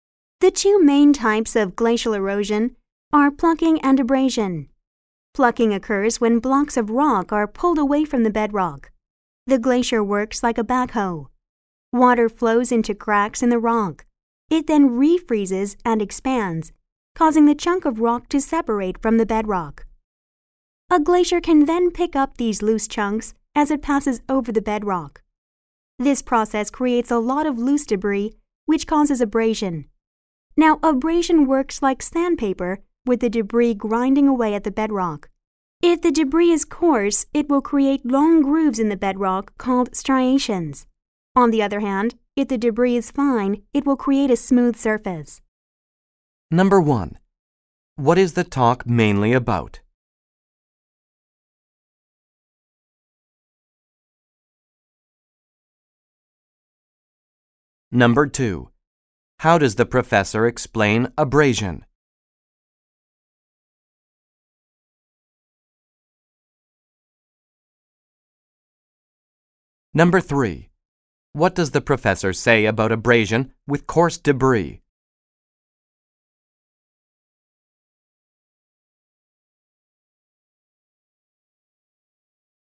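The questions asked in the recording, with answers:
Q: What is the talk mainly about?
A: The two main types of glacial erosion: plucking and abrasion

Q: How does the professor explain abrasion?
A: By comparing it to sandpaper, with debris grinding away at the bedrock

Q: What does the professor say about abrasion with coarse debris?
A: It creates long grooves in the bedrock called striations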